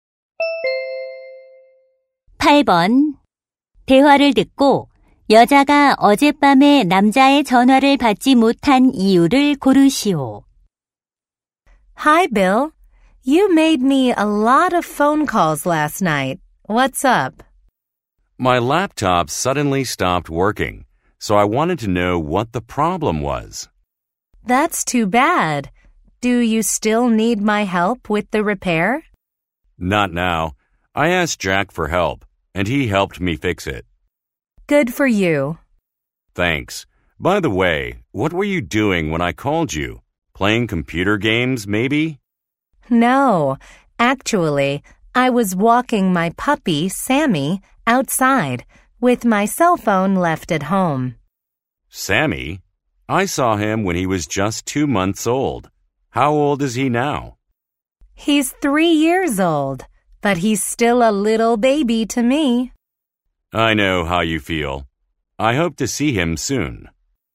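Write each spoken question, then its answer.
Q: 대화를 듣고 여자가 어젯밤에 남자의 전화를 받지 못한 이유를 고르시오.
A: 휴대전화를 집에 두고 강아지를 산책시켜서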